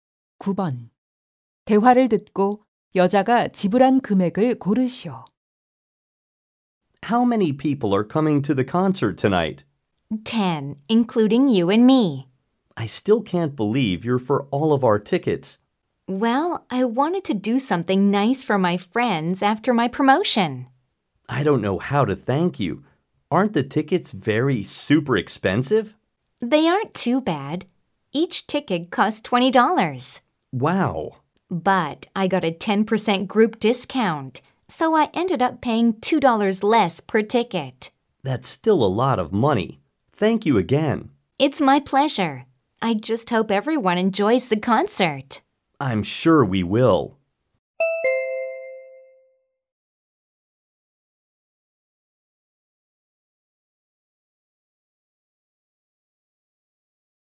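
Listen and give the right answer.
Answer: $180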